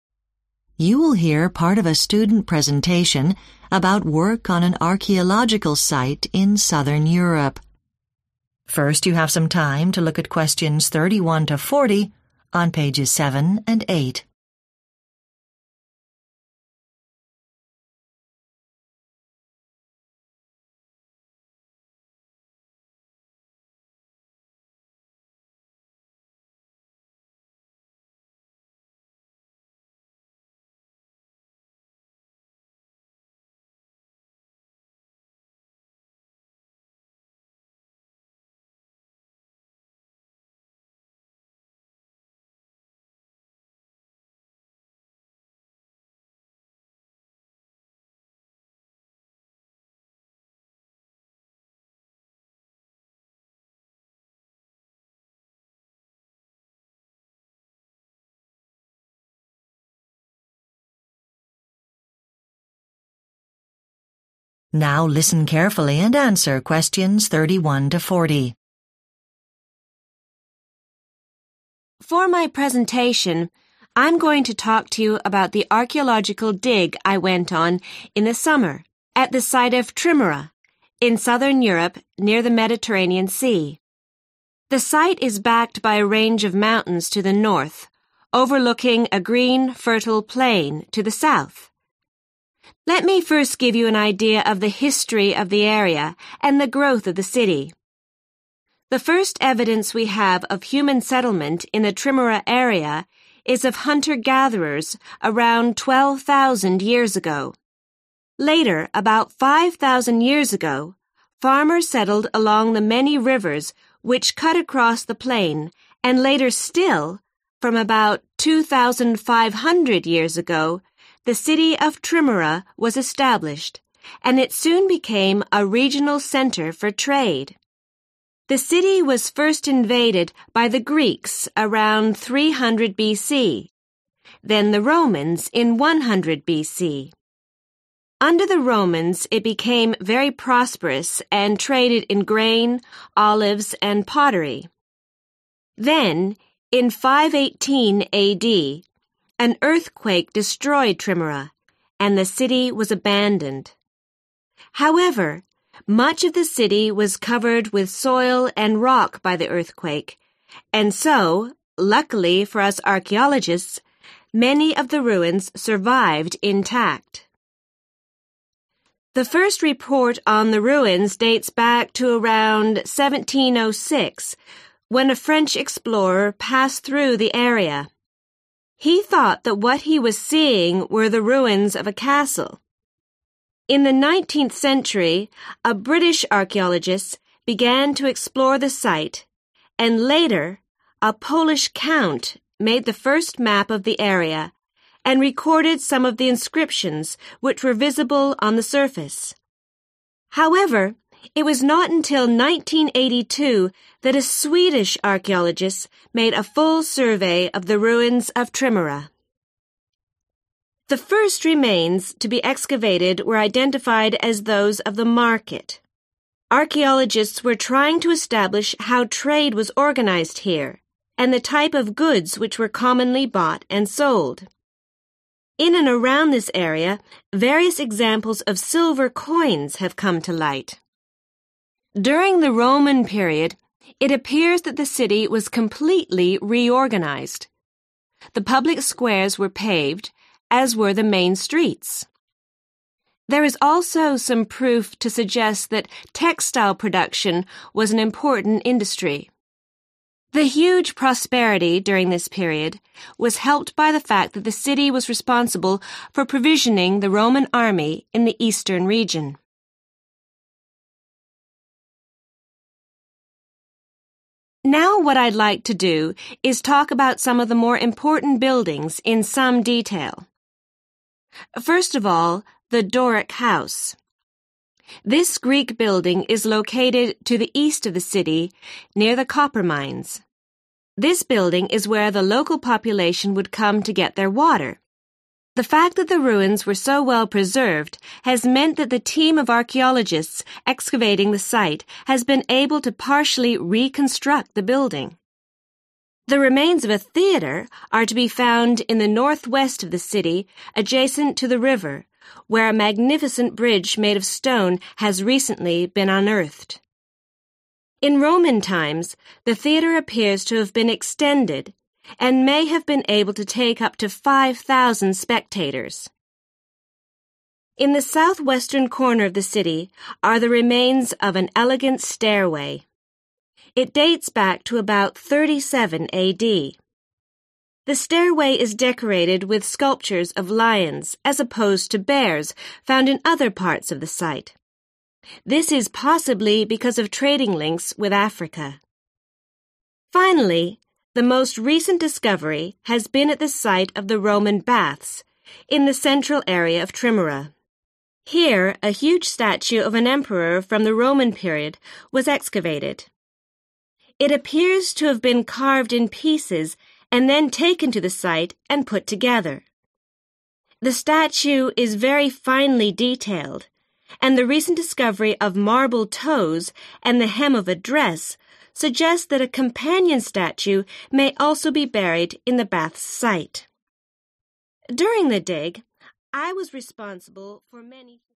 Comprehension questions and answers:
Complete the notes below.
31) 100 BC: invaded by Romans – trade in grain, olives and 31 _______________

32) 1706: French explorer believed the site was the remains of a 32 _______________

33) 1982: a complete 33 _______________ was made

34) the 34 _______________ was the first place to be excavated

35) a number of 35 _______________ were discovered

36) evidence of a 36 _______________ industry was found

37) The excavation found a system of channels for fresh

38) was discovered near the temple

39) Decorative statues of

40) A coin depicting a Roman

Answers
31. pottery
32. castle
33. survey
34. market
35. coins
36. textile
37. water
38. bridge
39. lions
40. emperor